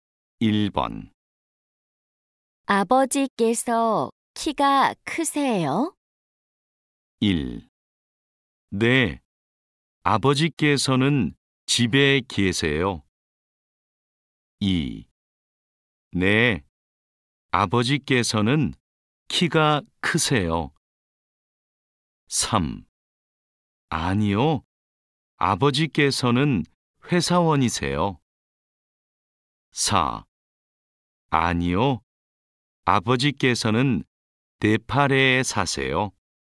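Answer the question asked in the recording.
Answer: 2: 네, 아버지께서는 키가 크세요.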